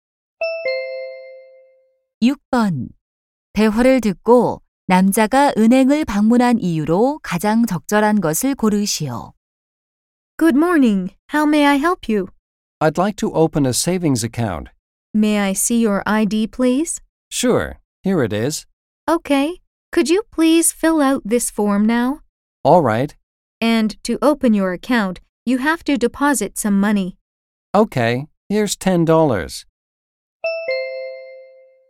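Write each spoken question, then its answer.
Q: 대화를 듣고 남자가 은행을 방문한 이유로 가장 적절한 것을 고르시오.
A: 예금 계좌 개설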